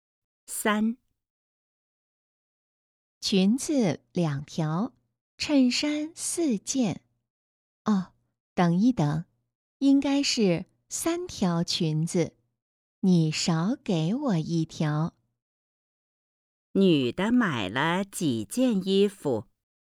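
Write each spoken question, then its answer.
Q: 女的买了几件衣服?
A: 7件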